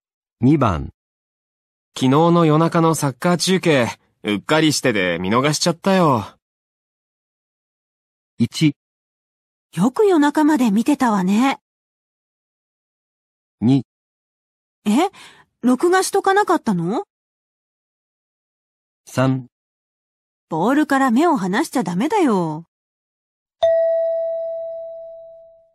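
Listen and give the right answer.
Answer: 2: え?録画しとかなかったの?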